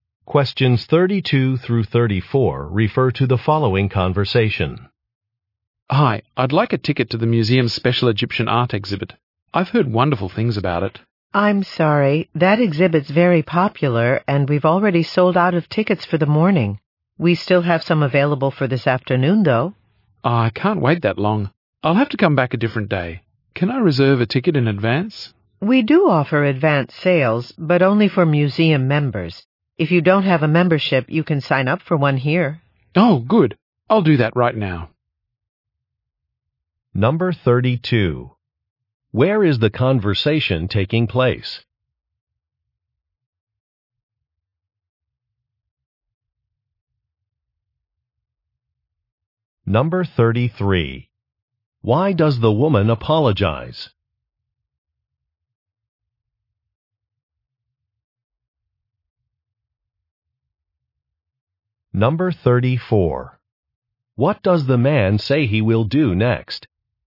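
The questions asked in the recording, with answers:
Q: Where is the conversation taking place?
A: At a museum

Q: Why does the woman apologize?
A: Morning tickets for the exhibit are sold out

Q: What does the man say he will do next?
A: Sign up for a museum membership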